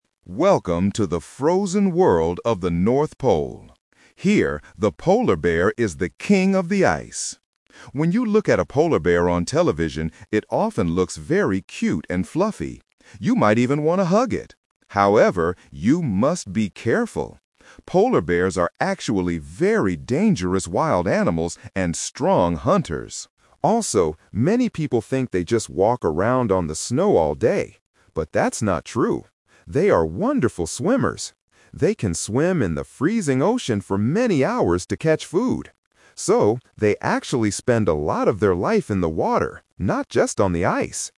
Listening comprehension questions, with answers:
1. How do polar bears usually look on television?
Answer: Cute and fluffy.

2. What do many people mistakenly think polar bears do all day?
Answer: Walk around on the snow.

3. Where do polar bears actually spend a lot of their time?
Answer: In the water.

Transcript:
Narrator: Welcome to the frozen world of the North Pole. Here, the polar bear is the king of the ice. When you look at a polar bear on television, it often looks very cute and fluffy. You might even want to hug it. However, you must be careful! Polar bears are actually very dangerous wild animals and strong hunters. Also, many people think they just walk around on the snow all day. But that's not true. They are wonderful swimmers. They can swim in the freezing ocean for many hours to catch food. So, they actually spend a lot of their life in the water, not just on the ice.

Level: A2